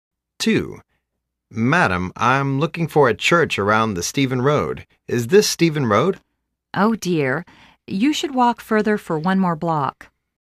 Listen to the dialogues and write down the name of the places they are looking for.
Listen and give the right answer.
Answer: Church